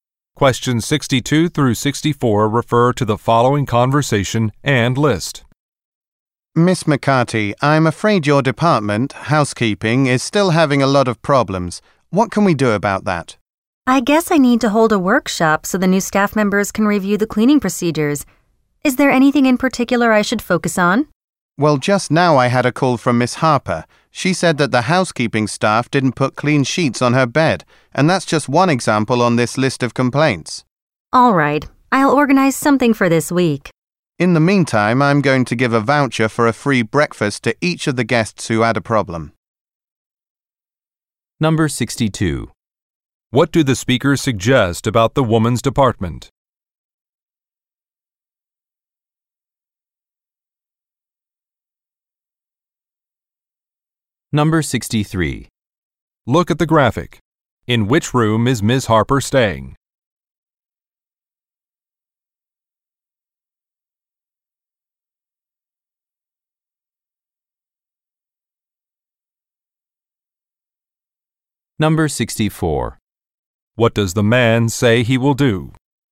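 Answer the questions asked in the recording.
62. Its staff need training on cleaning procedures
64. Give free breakfast vouchers to guests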